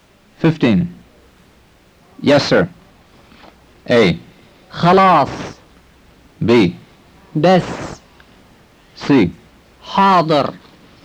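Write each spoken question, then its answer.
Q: Yes, sir.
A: C: حاضر.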